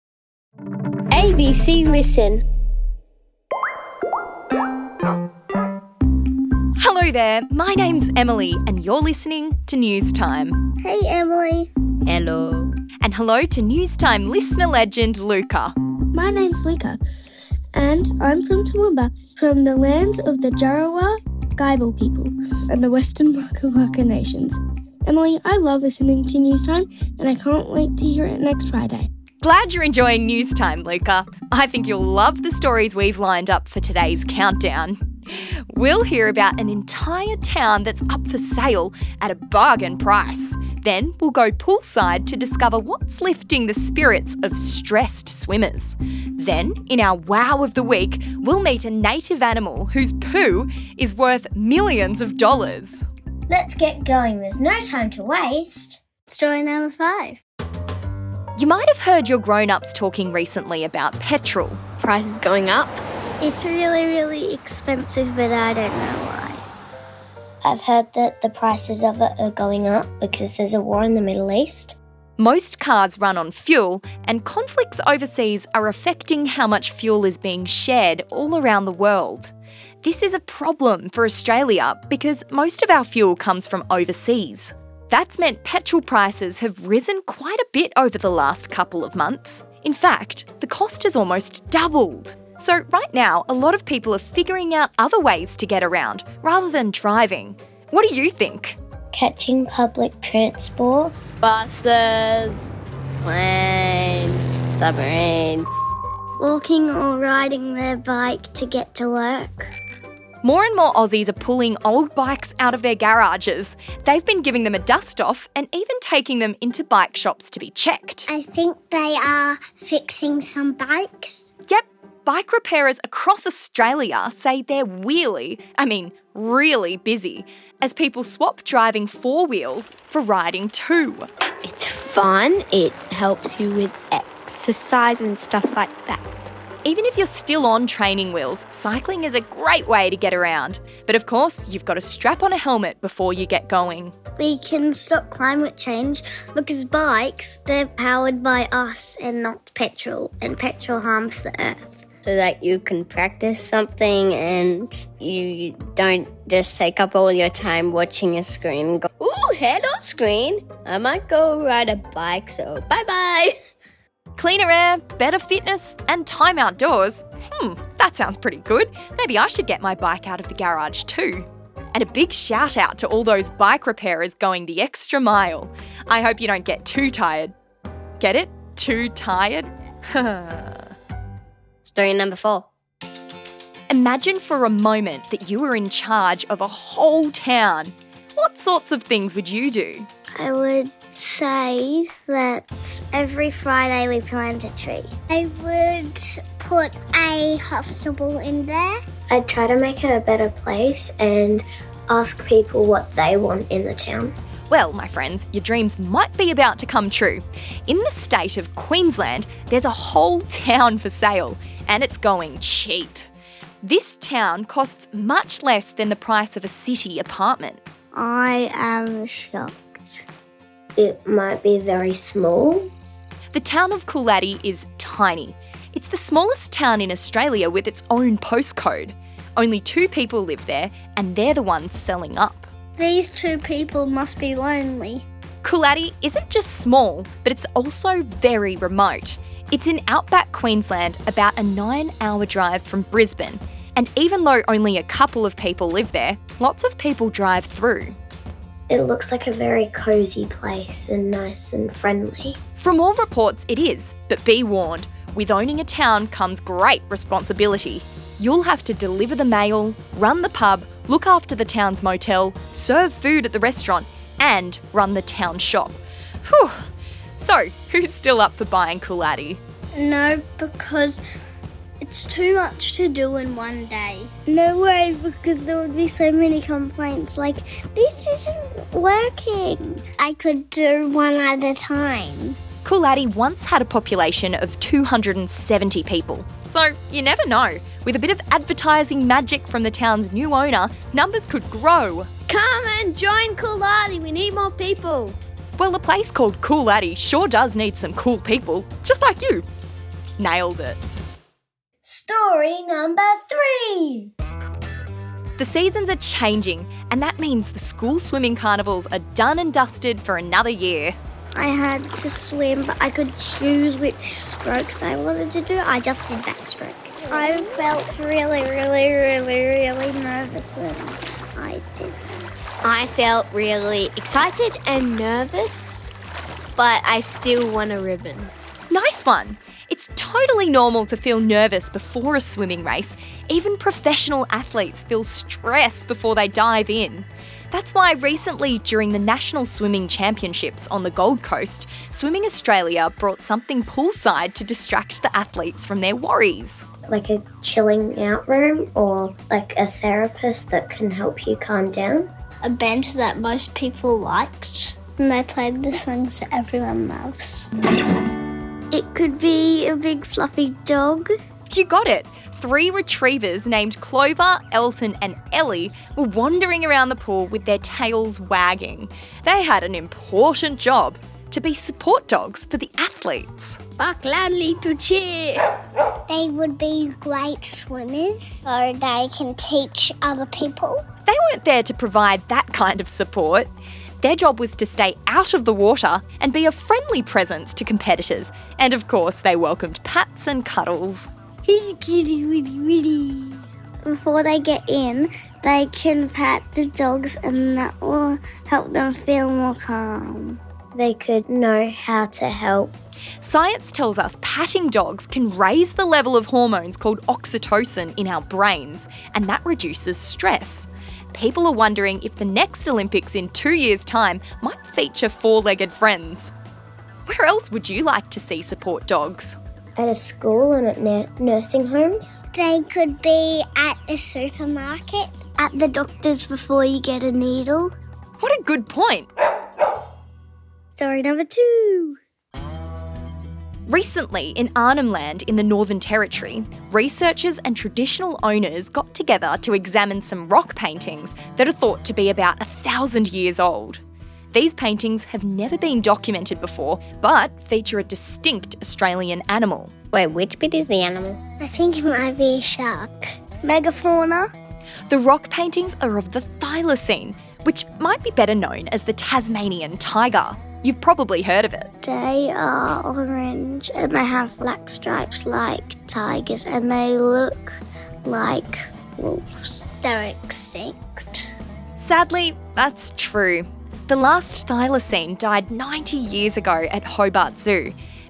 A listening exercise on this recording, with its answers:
More people have been travelling around on WHAT mode of transport?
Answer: Bicycles